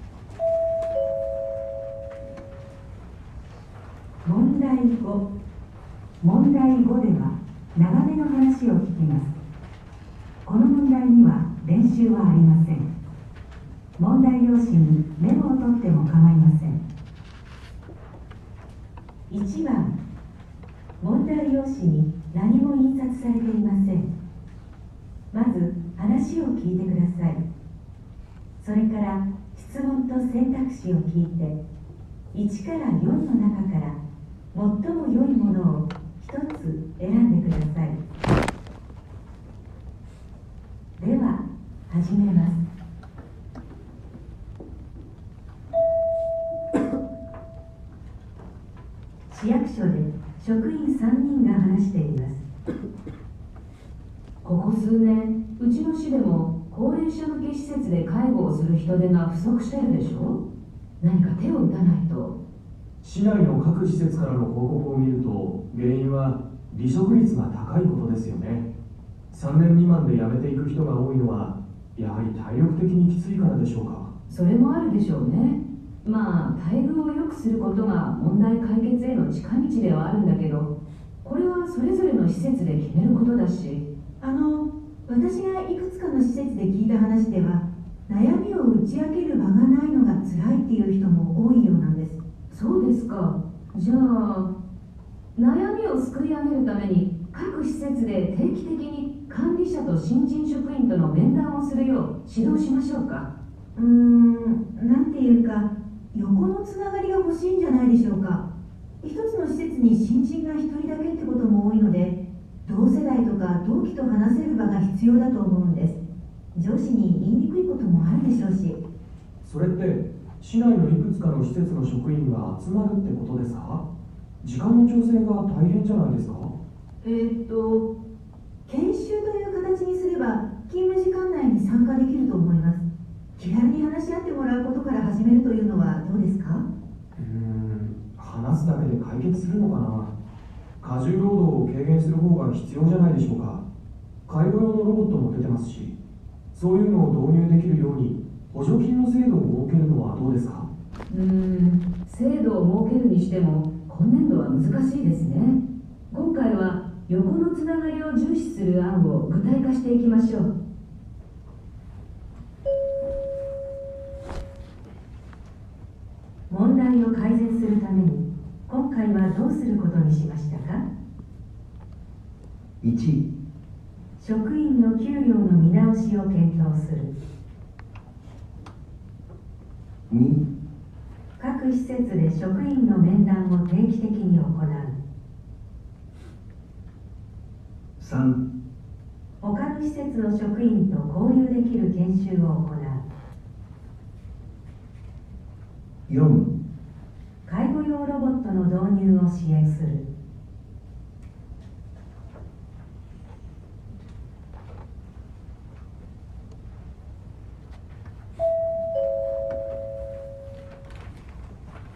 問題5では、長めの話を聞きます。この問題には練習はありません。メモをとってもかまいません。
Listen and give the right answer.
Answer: 3

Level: N1 Listening · Test 2